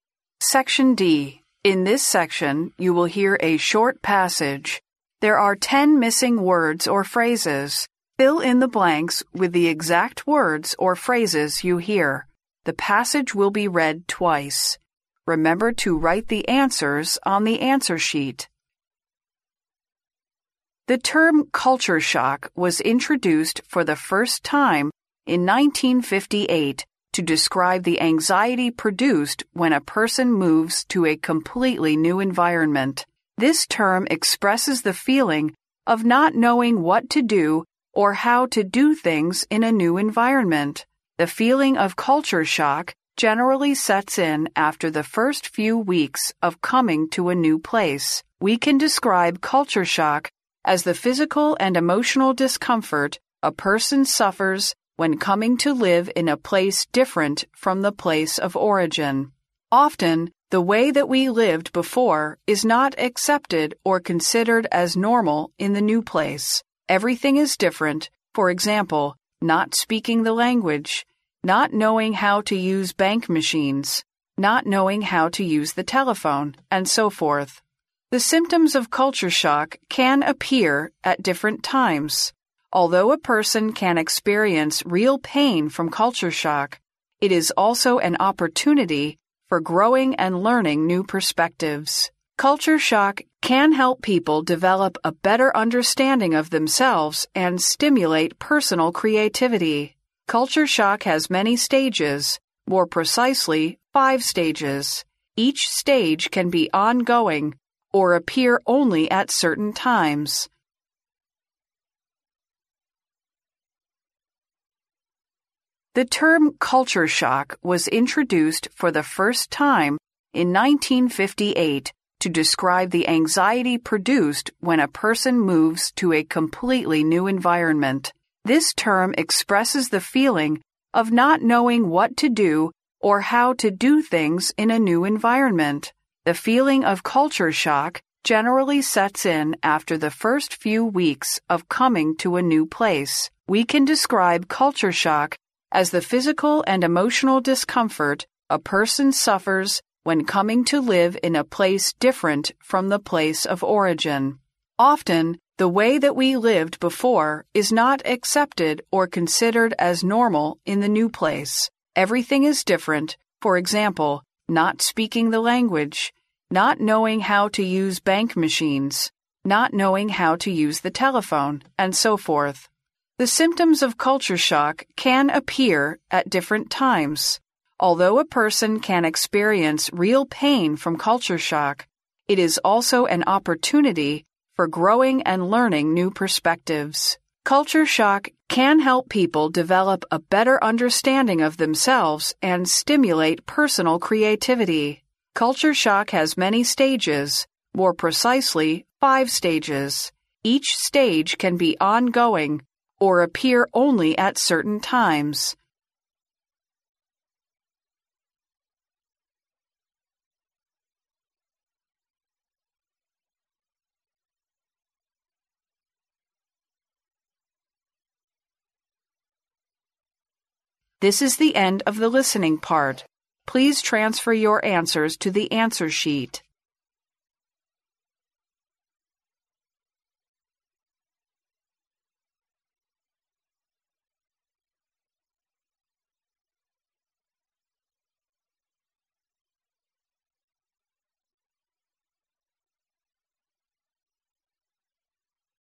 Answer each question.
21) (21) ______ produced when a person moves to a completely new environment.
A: anxiety

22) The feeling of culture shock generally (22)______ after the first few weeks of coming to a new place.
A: sets in

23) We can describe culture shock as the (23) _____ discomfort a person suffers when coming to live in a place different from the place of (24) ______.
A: physical and emotional

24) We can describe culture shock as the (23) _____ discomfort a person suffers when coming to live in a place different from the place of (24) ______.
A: origin

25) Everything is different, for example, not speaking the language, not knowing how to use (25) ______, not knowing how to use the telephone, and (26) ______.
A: banking machines

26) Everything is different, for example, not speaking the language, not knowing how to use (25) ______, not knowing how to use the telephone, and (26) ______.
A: so forth

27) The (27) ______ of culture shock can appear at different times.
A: symptoms

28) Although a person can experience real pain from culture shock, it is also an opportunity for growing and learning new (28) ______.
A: perspectives

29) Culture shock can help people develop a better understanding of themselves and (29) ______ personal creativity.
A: stimulate

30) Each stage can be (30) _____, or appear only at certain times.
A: ongoing

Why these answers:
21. 该录音主要是关于culture shock,开始时提到"The term culture shock was introduced...to describe the anxiety produced when a person moves to a completely new environment",由此可知,它讲的是一个人去完全陌生的地方产生的焦虑感,故应填入anxiety。
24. 录音中提到"when coming to live in a place different from the place of origin",感受到文化冲击是因为来到一个和以前不同的地方,故应填入origin。
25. 录音中提到"not knowing how to use banking machines",指的是不知道怎样使用银行的机器,故应填入banking machines。
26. 录音中列举了一系列与以往不同的状况,最后and so forth表示"等等",故应填入so forth。
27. 录音中提到"The symptoms of culture shock can appear at different times.",即受到文化冲击的症状会出现在不同的时期,故应填入symptoms。
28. 录音中提到"it is also an opportunity for growing and learning new perspectives",也就是文化冲击虽然会给人带来痛苦,但也使人获得成长和新的启示,故应填入perspectives,要注意使用其复数形式。
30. 录音中提到文化冲击可以分为五个阶段,而且"Each stage can be ongoing, or appear only at certain times.",即文化冲击在每个阶段某一时间会继续存在或出现,故应填入ongoing。

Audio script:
The term culture shock was introduced for the first time in 1958 to describe the anxiety produced when a person moves to a completely new environment. This term expresses the feeling of not knowing what to do or how to do things in a new environment. The feeling of culture shock generally sets in after the first few weeks of coming to a new place.
We can describe culture shock as the physical and emotional discomfort a person suffers when coming to live in a place different from the place of origin. Often, the way that we lived before is not accepted or considered as normal in the new place. Everything is different, for example, not speaking the language, not knowing how to use banking machines, not knowing how to use the telephone, and so forth.
The symptoms of culture shock can appear at different times. Although, a person can experience real pain from culture shock; it is also an opportunity for growing and learning new perspectives. Culture shock can help people develop a better understanding of themselves and stimulate personal creativity.
Culture shock has many stages, more precisely, five stages. Each stage can be ongoing, or appear only at certain times.